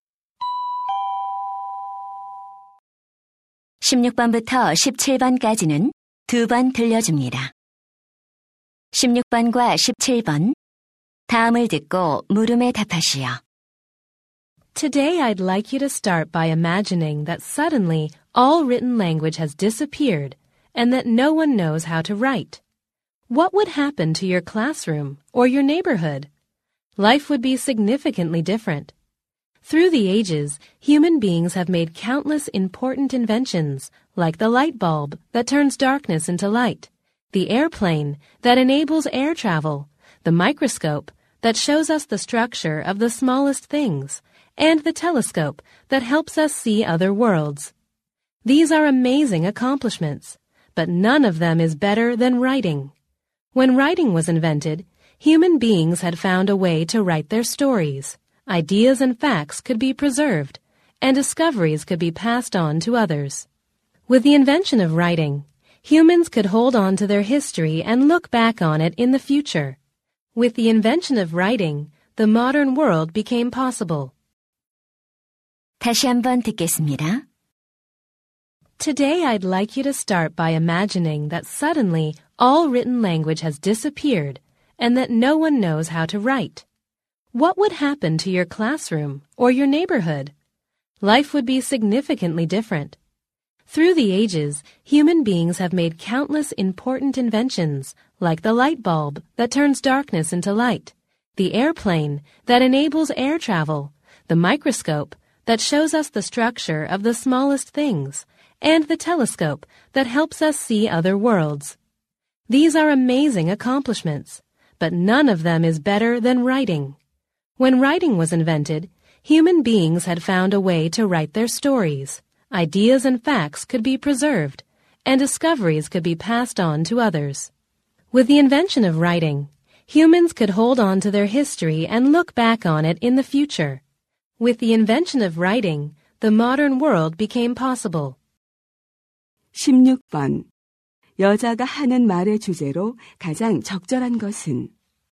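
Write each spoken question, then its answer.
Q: 여자가 하는 말의 주제로 가장 적절한 것은?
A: 인류 최고의 발명품으로서 글쓰기의 중요성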